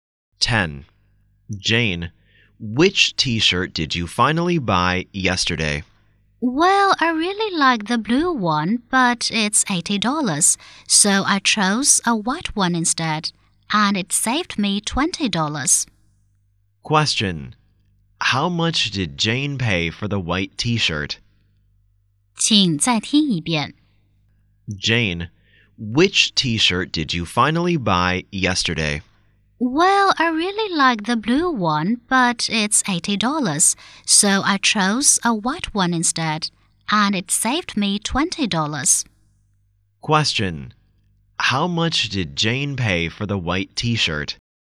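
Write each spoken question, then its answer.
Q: Question.How much did Jane pay for the white t-shirt?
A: $60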